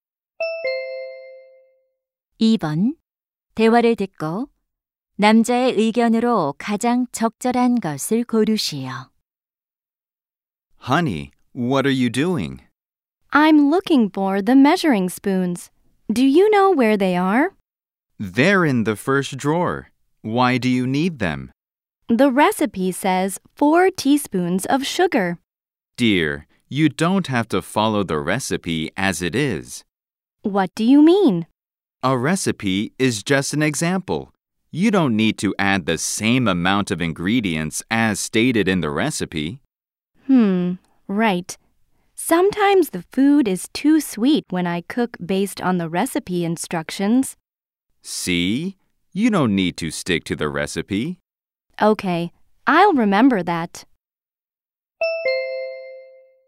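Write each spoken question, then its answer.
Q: 대화를 듣고 남자의 의견으로 가장 적절한 것을 고르시오.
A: 요리할 때 조리법을 그대로 따를 필요는 없다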